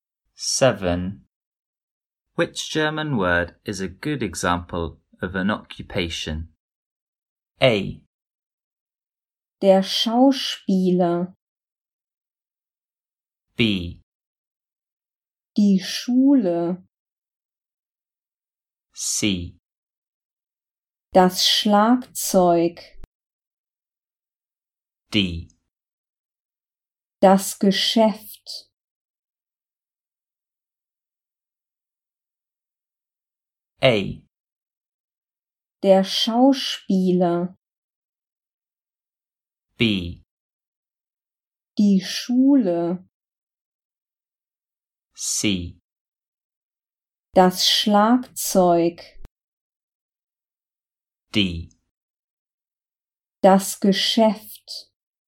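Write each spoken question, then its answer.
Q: Which German word is a good example of an occupation?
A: A: Der Schauspieler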